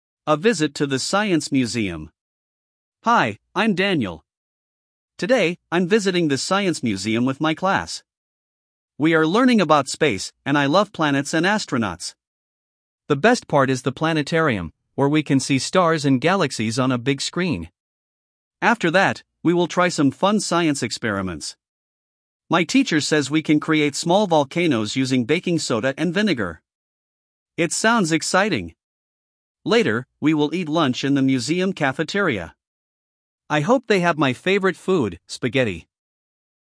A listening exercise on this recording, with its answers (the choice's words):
1. Ты услышишь сообщение. Для каждого предложения А–Е выбери один правильный вариант ответа из трёх предложенных (1, 2 или 3). Ты услышишь текст дважды.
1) What is Daniel's favorite topic at the museum?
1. Dinosaurs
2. Space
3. Ancient history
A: Space

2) What is the best part of the museum for Daniel?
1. The planetarium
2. The experiment room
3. The dinosaur exhibit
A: The planetarium

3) What science experiment will Daniel try?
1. Growing plants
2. Making a volcano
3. Mixing colors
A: Making a volcano

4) What does Daniel hope to eat?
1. Pizza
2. Spaghetti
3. Sandwiches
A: Spaghetti

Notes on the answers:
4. Later, we will eat lunch in the museum cafeteria. I hope they have my favorite food – spaghetti!

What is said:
«A Visit to the Science Museum»
Hi, I'm Daniel. Today, I'm visiting the science museum with my class. We are learning about space, and I love planets and astronauts. The best part is the planetarium, where we can see stars and galaxies on a big screen.
After that, we will try some fun science experiments. My teacher says we can create small volcanoes using baking soda and vinegar. It sounds exciting!
Later, we will eat lunch in the museum cafeteria. I hope they have my favorite food – spaghetti!

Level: 4 класс